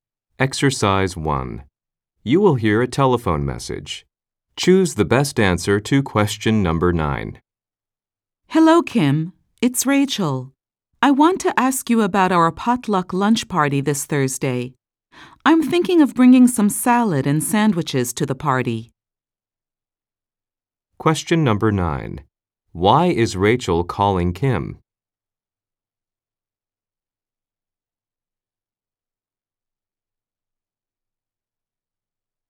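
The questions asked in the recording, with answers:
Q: Why is Rachel calling Kim?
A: To ask about their potluck lunch party this Thursday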